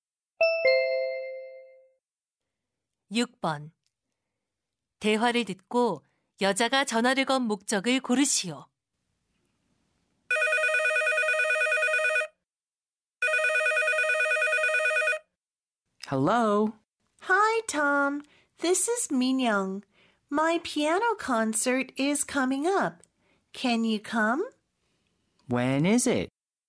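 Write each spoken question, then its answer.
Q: 대화를 듣고 여자가 전화를 건 목적을 고르시오.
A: 피아노 연주회에 초대하려고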